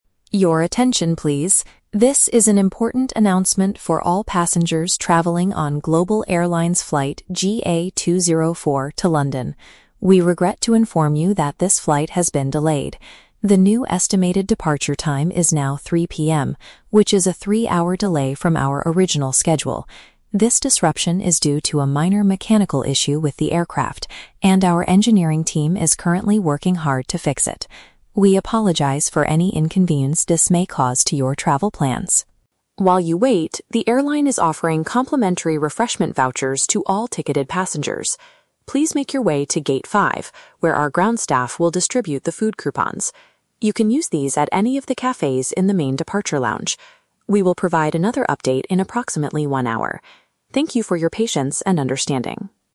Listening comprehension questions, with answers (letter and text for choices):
Listen to the airport announcement. Choose the correct answer (A, B, or C) for each question.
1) Why is the flight to London delayed?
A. There is a severe weather problem in London.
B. The airplane needs some technical repairs.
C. The engineering team arrived at the airport late.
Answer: B. The airplane needs some technical repairs.

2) How long is the delay for this flight?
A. One hour.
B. Three hours.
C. Five hours.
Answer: B. Three hours.

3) What should passengers do next?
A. Go to Gate 5 to collect a free meal ticket.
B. Walk to the departure lounge to buy some food.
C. Speak to the ground staff to get a new flight ticket.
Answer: A. Go to Gate 5 to collect a free meal ticket.

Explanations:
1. The announcer says the delay is due to a "minor mechanical issue with the aircraft" and the team is "working hard to fix it." Option (B) correctly paraphrases this situation.
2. The announcer explicitly states that it is a "three-hour delay from our original schedule."
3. Passengers are told to "make your way to Gate 5" to get "complimentary refreshment vouchers" (which means free food coupons/tickets).

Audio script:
Announcer: Your attention, please. This is an important announcement for all passengers traveling on Global Airlines flight GA 204 to London. We regret to inform you that this flight has been delayed. The new estimated departure time is now 3:00 PM, which is a three-hour delay from our original schedule. This disruption is due to a minor mechanical issue with the aircraft, and our engineering team is currently working hard to fix it. We apologize for any inconvenience this may cause to your travel plans.
While you wait, the airline is offering complimentary refreshment vouchers to all ticketed passengers. Please make your way to Gate 5, where our ground staff will distribute the food coupons. You can use these at any of the cafes in the main departure lounge. We will provide another update in approximately one hour. Thank you for your patience and understanding.